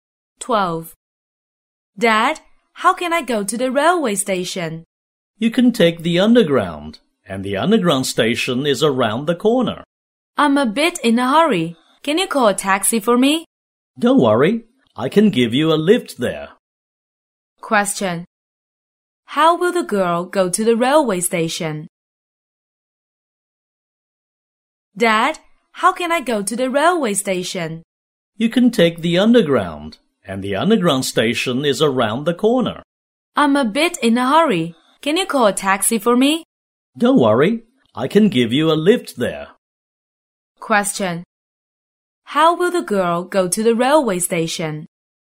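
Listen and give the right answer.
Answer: By car (her dad drives her)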